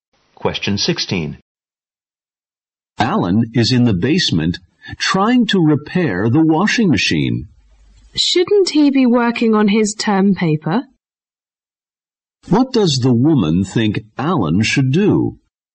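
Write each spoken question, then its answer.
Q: What does the woman think Alan should do?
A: Work on his term paper.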